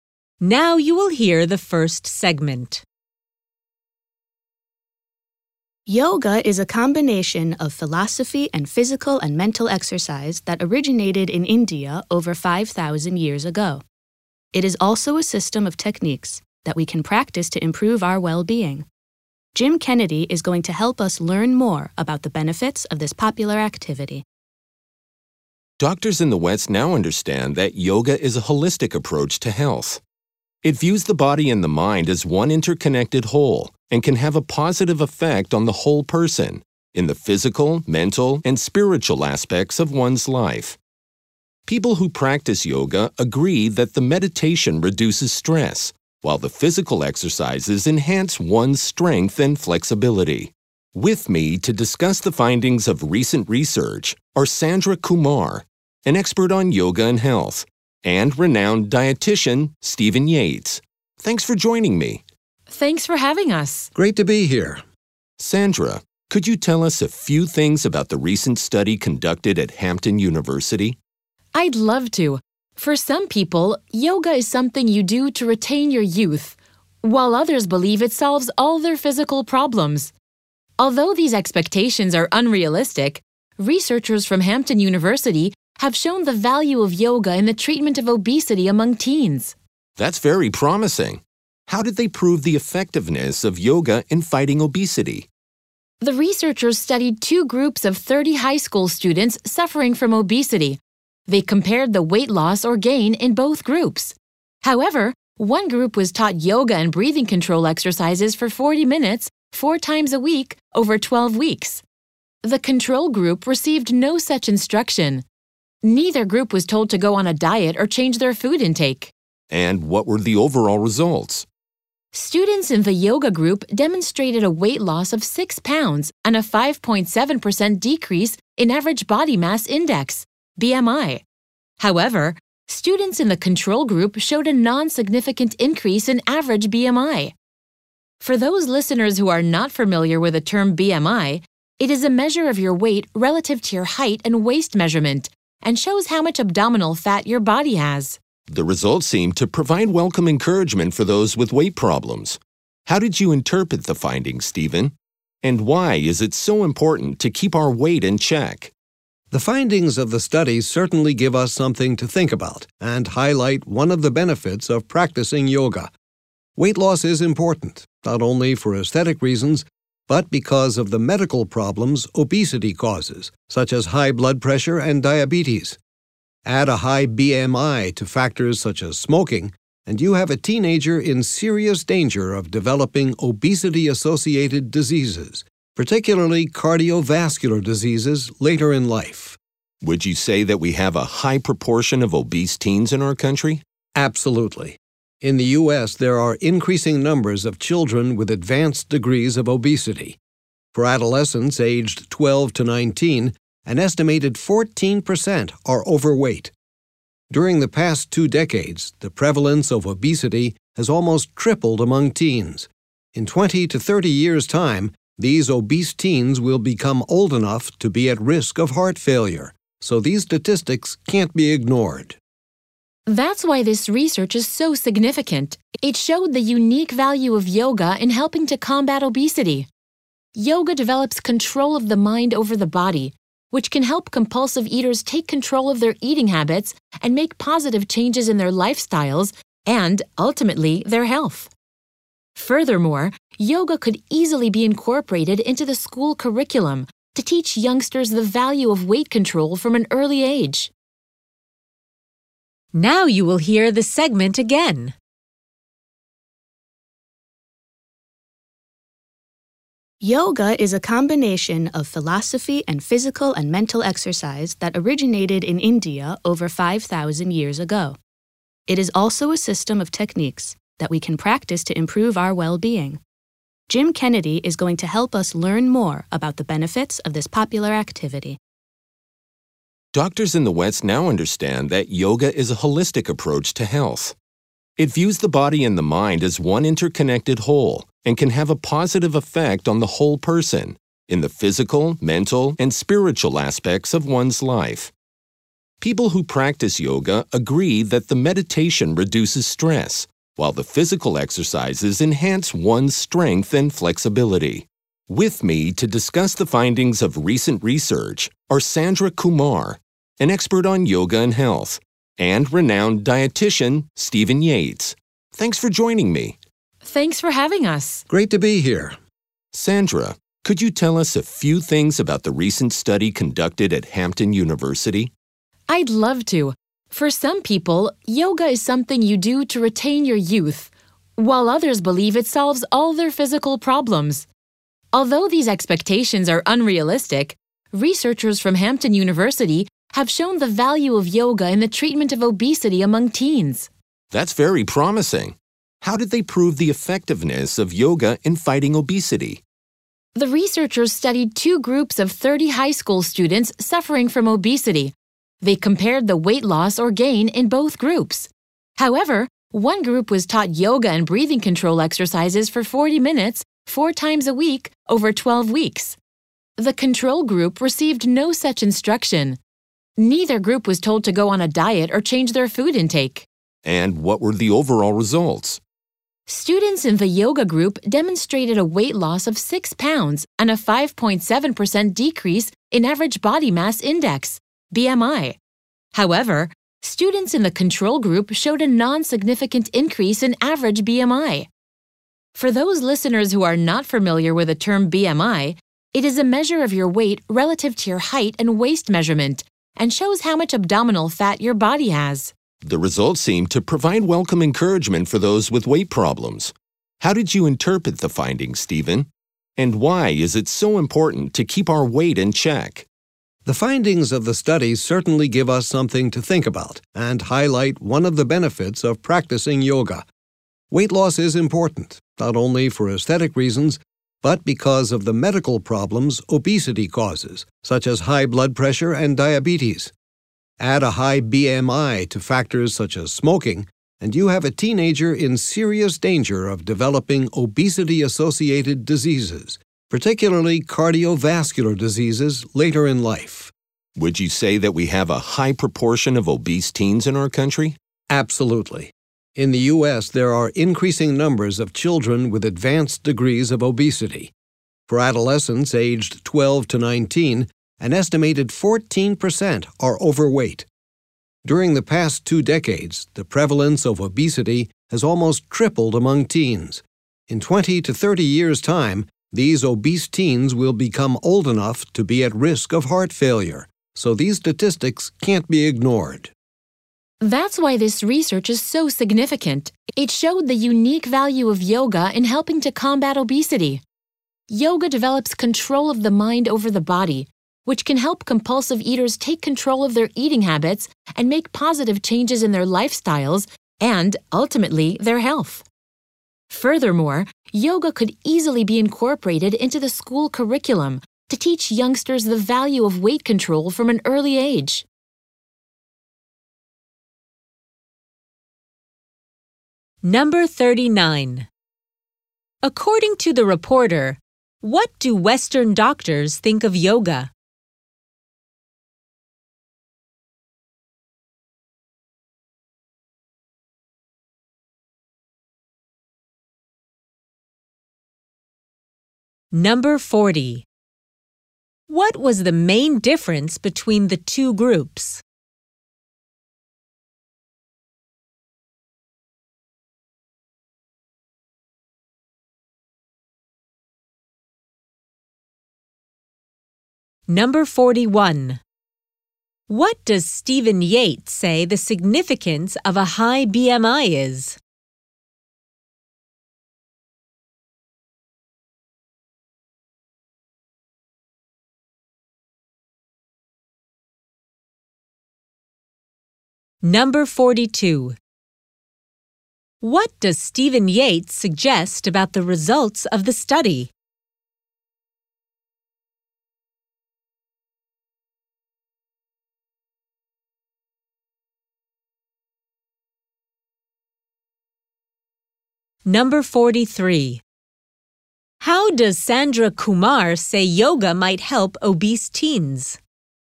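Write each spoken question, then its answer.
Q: According to the reporter, what do Western doctors think of yoga?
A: It is a holistic approach to health that treats body and mind as one whole

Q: What was the main difference between the two groups?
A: One group was taught yoga and breathing control exercises; the control group received no such instruction

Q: What does Stephen Yates say the significance of a high BMI is?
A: Combined with factors like smoking, it puts teens in serious danger of obesity-associated diseases, especially cardiovascular disease later in life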